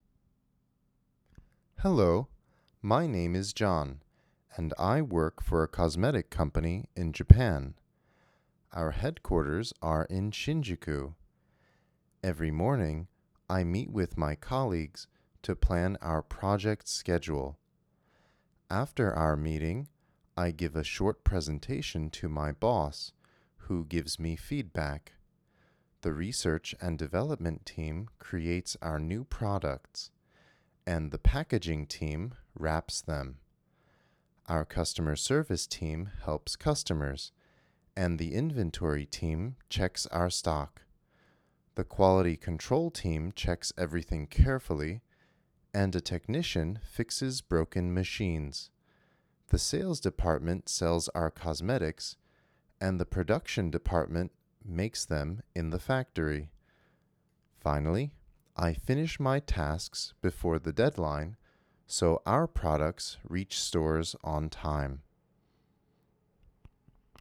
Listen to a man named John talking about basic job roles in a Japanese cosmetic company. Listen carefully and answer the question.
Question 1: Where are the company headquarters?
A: The company headquarters are in Shinjuku.

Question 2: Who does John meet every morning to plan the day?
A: He meets with his colleagues.

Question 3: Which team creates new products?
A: The Research and Development team.

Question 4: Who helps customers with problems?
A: The Customer Service team.

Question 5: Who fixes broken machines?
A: A Technician.

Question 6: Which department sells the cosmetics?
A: The Sales department.

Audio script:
Hello! My name is John, and I work for a cosmetic company in Japan. Our headquarters are in Shinjuku. Every morning, I meet with my colleagues to plan our project schedule. After our meeting, I give a short presentation to my boss, who gives me feedback. The Research and Development team creates our new products, and the Packaging team wraps them. Our Customer Service team helps customers, and the Inventory team checks our stock. The Quality Control team checks everything carefully, and a Technician fixes broken machines. The Sales department sells our cosmetics, and the Production department makes them in the factory. Finally, I finish my tasks before the deadline, so our products reach stores on time!